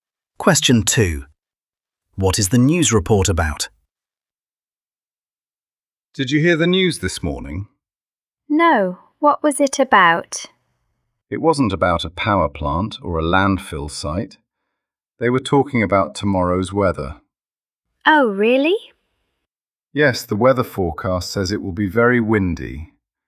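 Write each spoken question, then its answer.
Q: What is the news report about?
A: the weather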